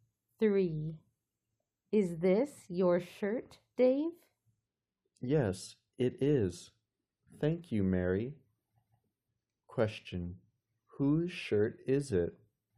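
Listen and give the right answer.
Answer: Dave's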